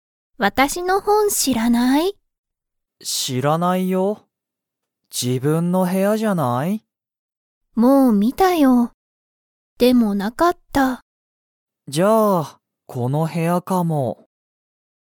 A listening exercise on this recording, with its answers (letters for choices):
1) アミの本ほんは、アミの部屋へやにありましたか?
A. はい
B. いいえ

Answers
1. B

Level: Level 1